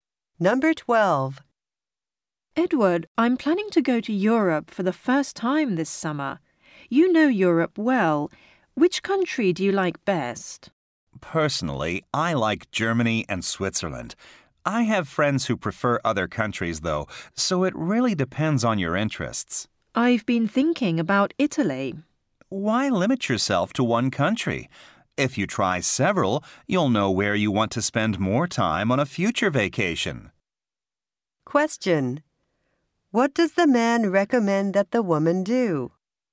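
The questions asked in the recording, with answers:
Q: What does the man recommend that the woman do?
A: Visit several countries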